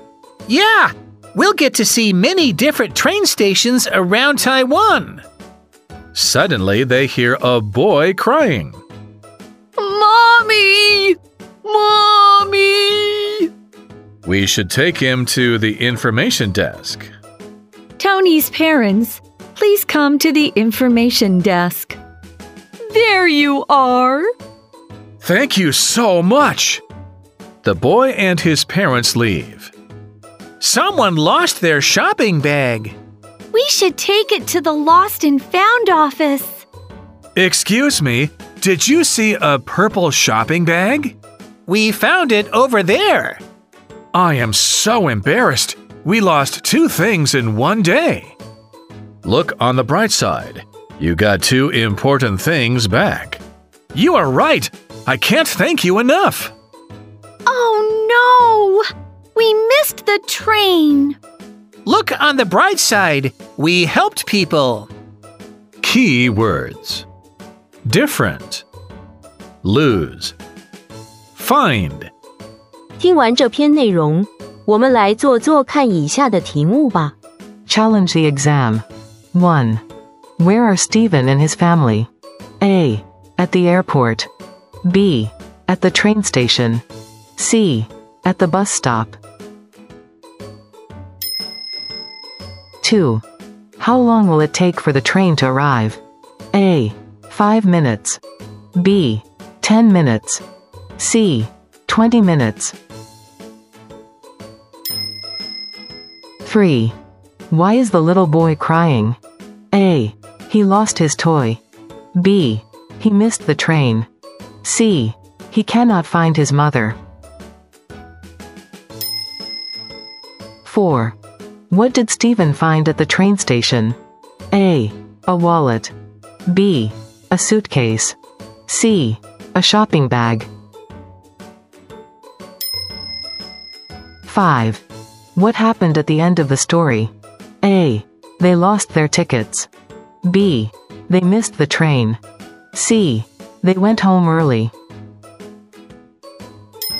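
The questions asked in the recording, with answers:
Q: Where are Stephen and his family?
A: B: At the train station.

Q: How long will it take for the train to arrive?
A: B: 10 minutes.

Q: Why is the little boy crying?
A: C: He cannot find his mother.

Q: What did Stephen find at the train station?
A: C: A shopping bag.

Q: What happened at the end of the story?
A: B: They missed the train.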